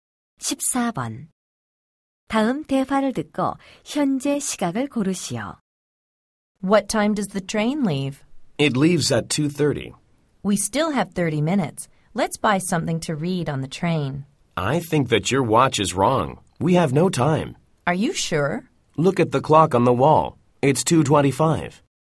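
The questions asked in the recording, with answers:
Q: 다음 대화를 듣고 현재 시각을 고르시오.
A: 2시 25분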